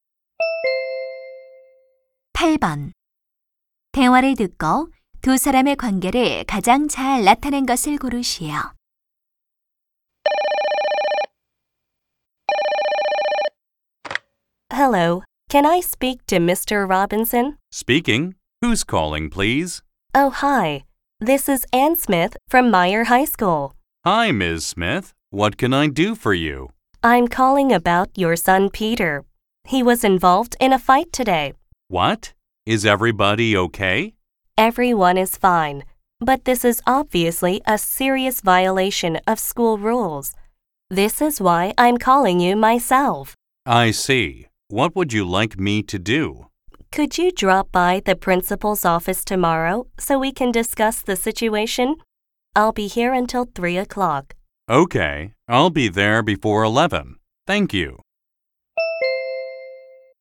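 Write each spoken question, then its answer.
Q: 대화를 듣고 두 사람의 관계를 가장 잘 나타낸 것을 고르시오.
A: 교사와 학부모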